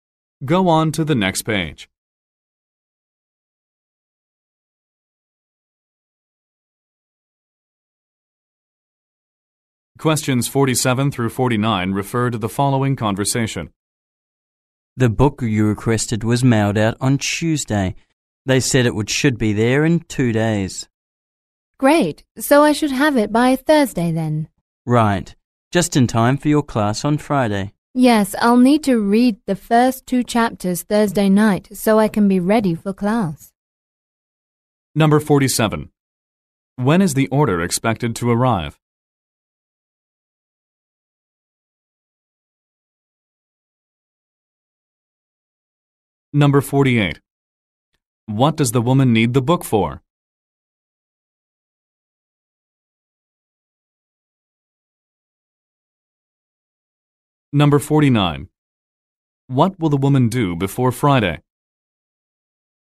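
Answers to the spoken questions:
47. Thursday
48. A class
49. Read the first two chapters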